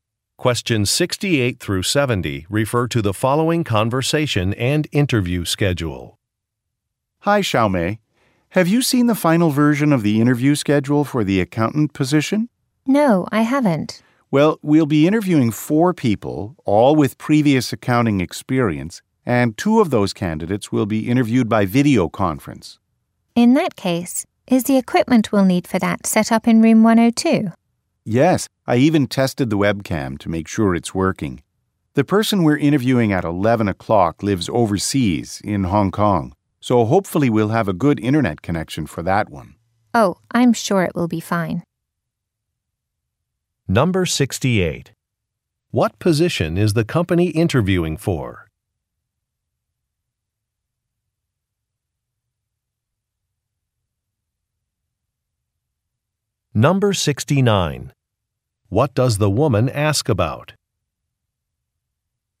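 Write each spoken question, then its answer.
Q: What position is the company interviewing for?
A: Accountant

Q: What does the woman ask about?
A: Whether the video conference equipment is set up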